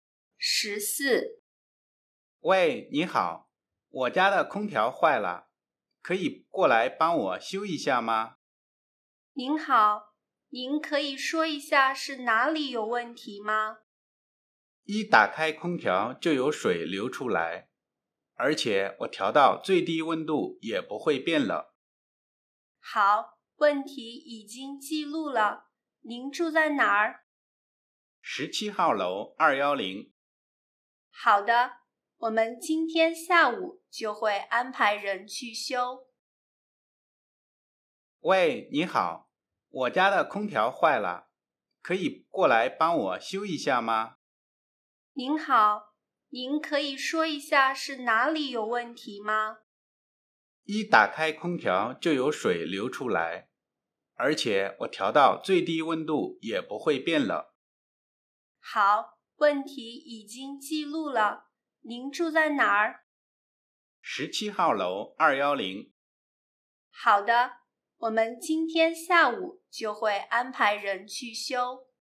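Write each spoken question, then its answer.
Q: 男的住在哪儿?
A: 17号楼210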